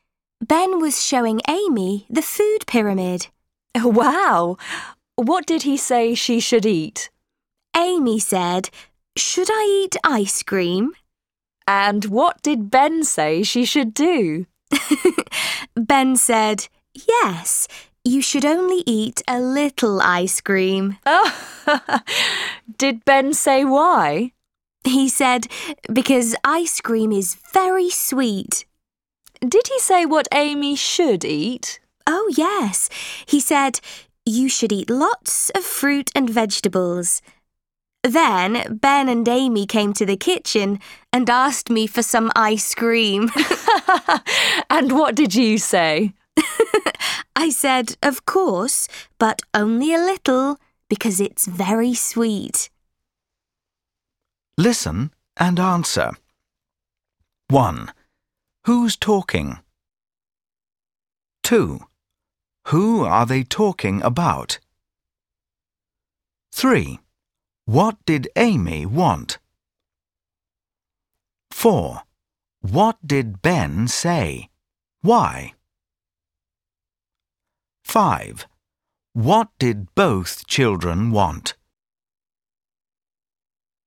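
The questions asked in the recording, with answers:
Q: Who are they talking about?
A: Ben and Amy

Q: What did Amy want?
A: Ice cream

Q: What did Ben say? Why?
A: She should only eat a little ice cream, because it is very sweet

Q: What did both children want?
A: Some ice cream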